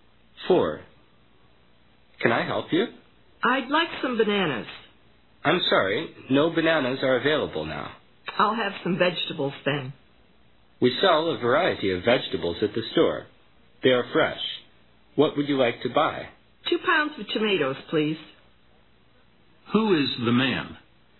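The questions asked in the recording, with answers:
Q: Who is the man?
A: A shop assistant selling vegetables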